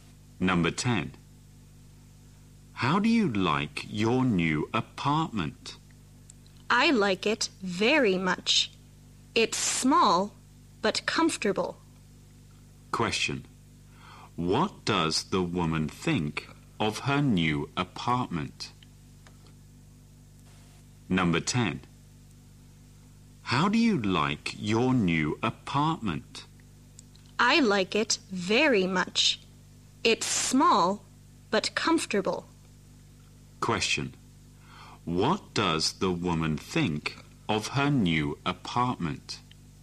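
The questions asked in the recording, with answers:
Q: What does the woman think of her new apartment?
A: She likes it; it's small but comfortable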